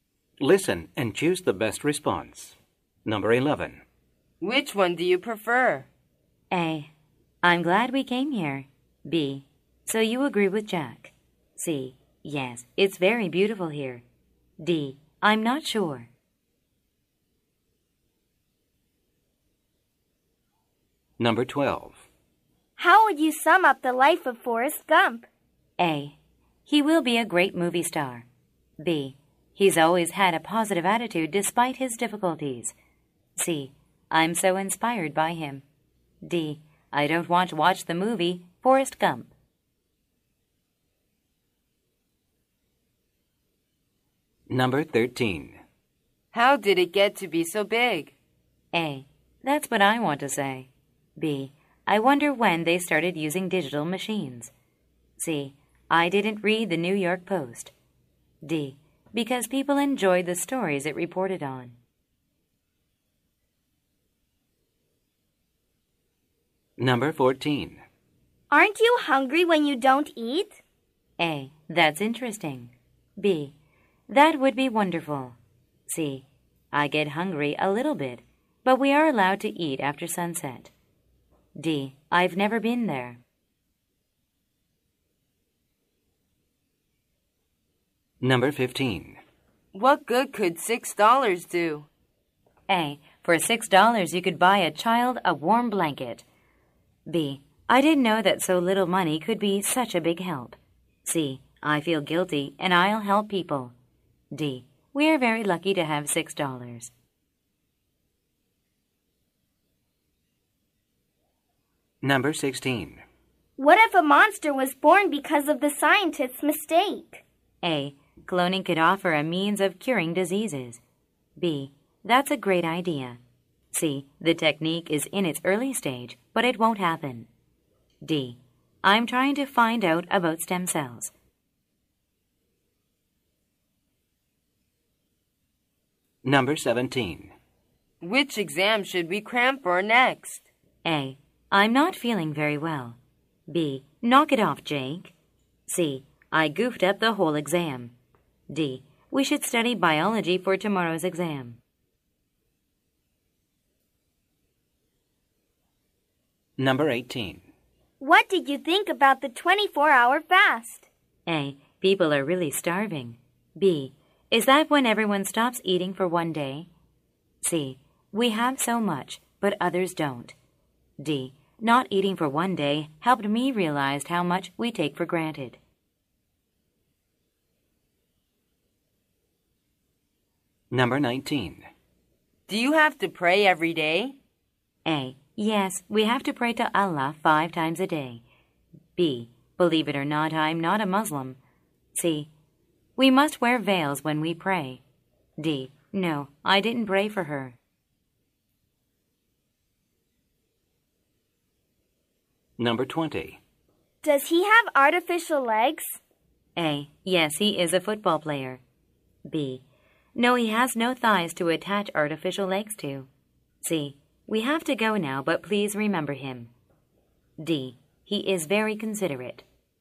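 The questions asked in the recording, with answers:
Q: How would you sum up the life of Forrest Gump?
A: B: He's always had a positive attitude despite his difficulties.

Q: How did it get to be so big?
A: D: Because people enjoyed the stories it reported on.

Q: Aren't you hungry when you don't eat?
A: C: I get hungry a little bit, but we are allowed to eat after sunset.

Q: What good could $6 do?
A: A: For $6 you could buy a child a warm blanket.

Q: What if a monster was born because of the scientist's mistake?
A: C: The technique is in its early stage, but it won't happen.

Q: Which exam should we cram for next?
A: D: We should study biology for tomorrow's exam.

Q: What did you think about the 24-hour fast?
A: D: Not eating for one day helped me realize how much we take for granted.

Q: Do you have to pray every day?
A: A: Yes, we have to pray to Allah 5 times a day.

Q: Does he have artificial legs?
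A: B: No, he has no thighs to attach artificial legs to.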